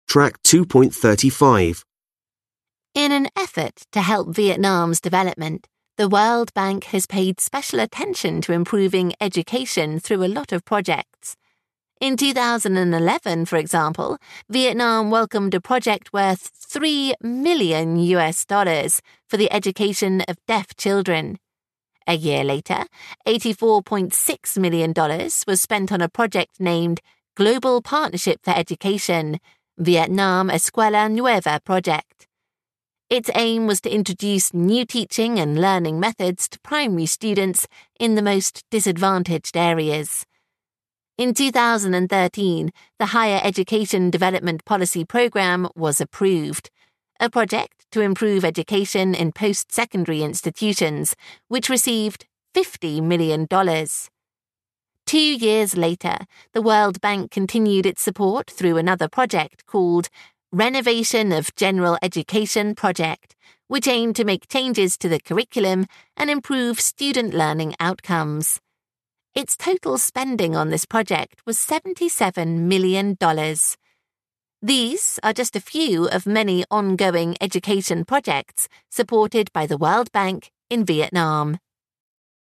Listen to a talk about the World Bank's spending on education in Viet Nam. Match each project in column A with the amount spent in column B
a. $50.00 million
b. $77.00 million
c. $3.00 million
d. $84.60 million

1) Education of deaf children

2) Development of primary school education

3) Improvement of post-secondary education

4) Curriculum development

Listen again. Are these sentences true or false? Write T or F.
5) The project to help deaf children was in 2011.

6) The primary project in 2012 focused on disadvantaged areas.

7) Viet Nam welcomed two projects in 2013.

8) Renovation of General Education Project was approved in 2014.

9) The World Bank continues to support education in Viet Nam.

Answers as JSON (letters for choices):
{"1": "c", "2": "d", "3": "a", "4": "b", "5": "T", "6": "T", "7": "F", "8": "F", "9": "T"}

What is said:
In an effort to help Vietnam's development. The World Bank has pay special attention to improving education through a lot of projects. In 2011, for example, Vietnam welcomed a project with $3.00 million for the eduction of deaf children. A year later, $84.60 million was spent on a project named "Global partnership for education, Vietnam Escuela Nueva project. Its aim was to introducing new teaching and learning methods to primary students in remote disadvantaged areas. In 2013, the higher education development policy program was approved. A project to improve education and post-secondary institution which receive $50.00 million. Two years later, the World Bank continued to support through a project called "Renovation of General Education Project" which aimed to make changes to the curriculum and improve student's learning outcomes. Its total spending on this project was $77.00 million. These are just a few of many ongoing education projects supported by the World Bank in Vietnam.